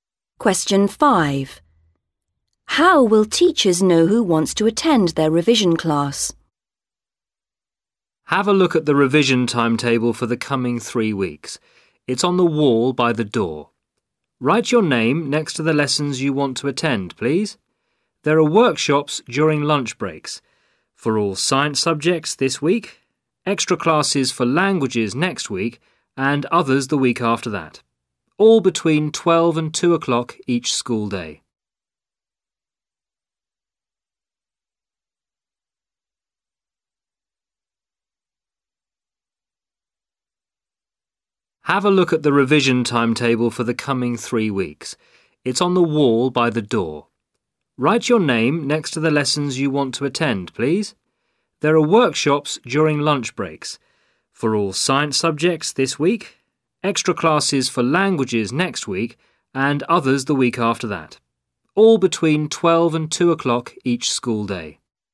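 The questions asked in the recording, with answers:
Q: How will teachers know who wants to attend their revision class?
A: Students write their names on the timetable next to the lessons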